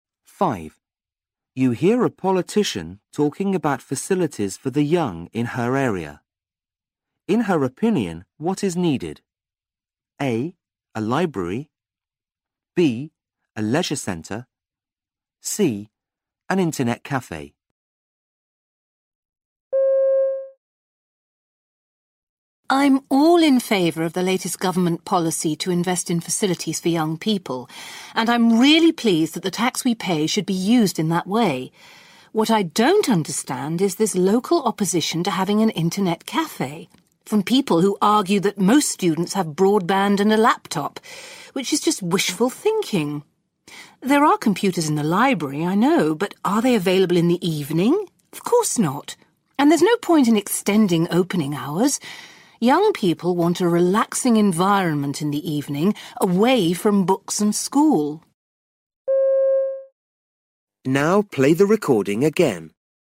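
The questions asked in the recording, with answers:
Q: In her opinion, what is needed?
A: C: An internet cafe.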